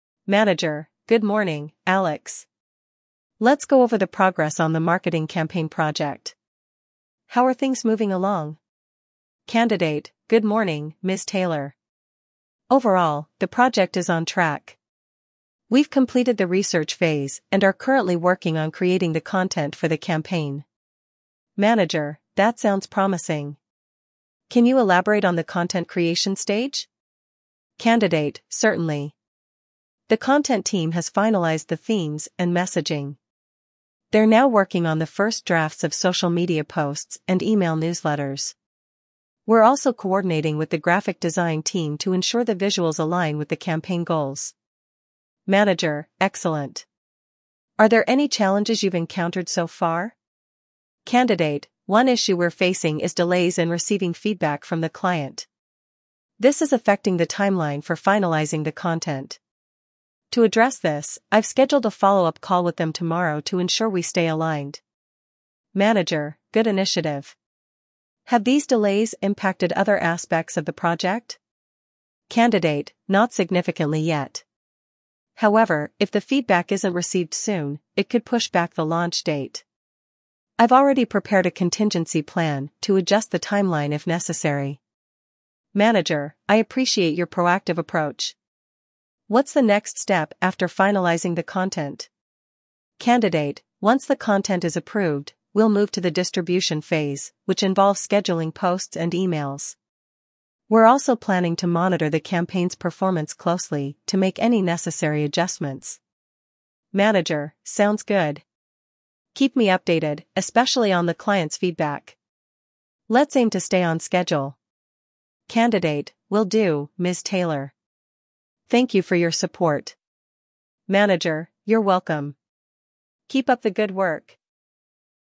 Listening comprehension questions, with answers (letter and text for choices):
Listen carefully to the audio conversation about project updates between Alex and Ms. Taylor. After listening, answer the following questions based on the details discussed in the conversation.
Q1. What stage is the project currently in?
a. Research phase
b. Content creation phase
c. Distribution phase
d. Monitoring phase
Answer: b. Content creation phase

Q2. What challenge is the team facing with the project?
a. Lack of resources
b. Delays in client feedback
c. Misalignment of visuals and messaging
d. Technical difficulties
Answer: b. Delays in client feedback

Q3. What action has Alex taken to address the delay in client feedback?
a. Scheduled a follow-up call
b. Revised the project timeline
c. Informed the graphic design team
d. Created new content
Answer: a. Scheduled a follow-up call

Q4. What is the next step after finalizing the content?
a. Client approval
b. Research phase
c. Distribution phase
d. Performance monitoring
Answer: c. Distribution phase

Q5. What quality of Alex's work does the manager appreciate?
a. Creativity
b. Timeliness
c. Proactive approach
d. Technical expertise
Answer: c. Proactive approach

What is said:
Manager: Good morning, Alex. Let's go over the progress on the marketing campaign project. How are things moving along?
Candidate: Good morning, Ms. Taylor. Overall, the project is on track. We've completed the research phase and are currently working on creating the content for the campaign.
Manager: That sounds promising. Can you elaborate on the content creation stage?
Candidate: Certainly. The content team has finalized the themes and messaging. They're now working on the first drafts of social media posts and email newsletters. We're also coordinating with the graphic design team to ensure the visuals align with the campaign goals.
Manager: Excellent. Are there any challenges you've encountered so far?
Candidate: One issue we're facing is delays in receiving feedback from the client. This is affecting the timeline for finalizing the content. To address this, I've scheduled a follow-up call with them tomorrow to ensure we stay aligned.
Manager: Good initiative. Have these delays impacted other aspects of the project?
Candidate: Not significantly yet. However, if the feedback isn't received soon, it could push back the launch date. I've already prepared a contingency plan to adjust the timeline if necessary.
Manager: I appreciate your proactive approach. What's the next step after finalizing the content?
Candidate: Once the content is approved, we'll move to the distribution phase, which involves scheduling posts and emails. We're also planning to monitor the campaign's performance closely to make any necessary adjustments.
Manager: Sounds good. Keep me updated, especially on the client's feedback. Let's aim to stay on schedule.
Candidate: Will do, Ms. Taylor. Thank you for your support.
Manager: You're welcome. Keep up the good work!